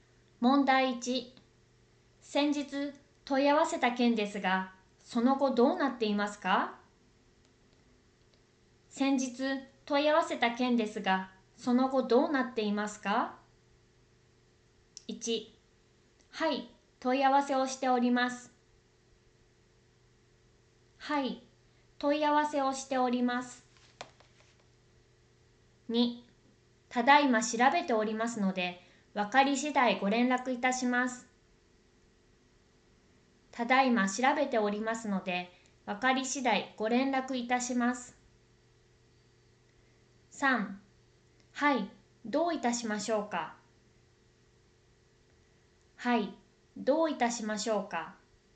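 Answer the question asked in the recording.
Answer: 2: ただいま調べておりますので、分かり次第ご連絡いたします。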